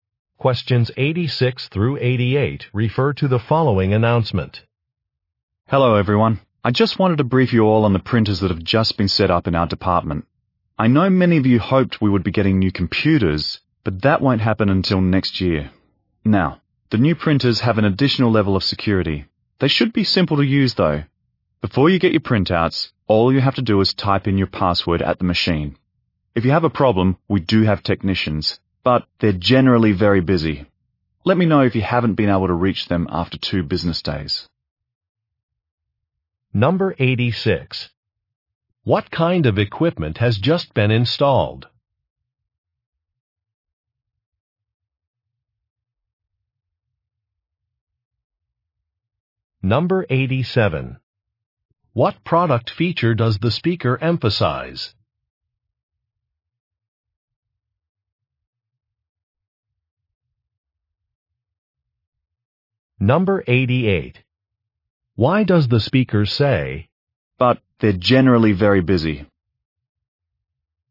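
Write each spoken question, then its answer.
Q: What kind of equipment has just been installed?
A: Printers

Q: What product feature does the speaker emphasize?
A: Extra security (password required)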